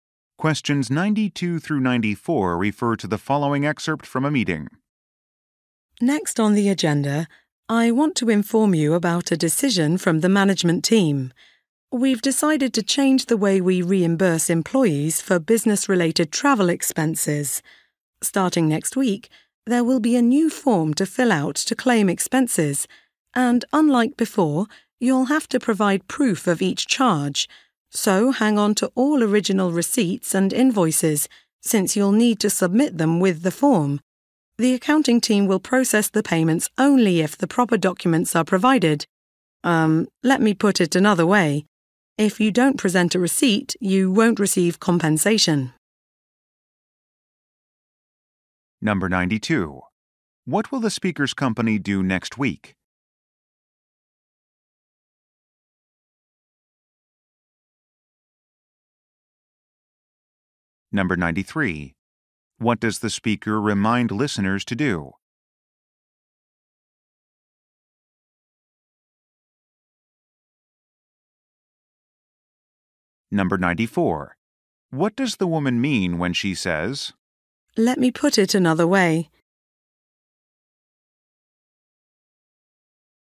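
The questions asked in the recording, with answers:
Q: What will the speaker's company do next week?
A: Start using a new expense claim form

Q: What does the speaker remind listeners to do?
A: Keep original receipts and invoices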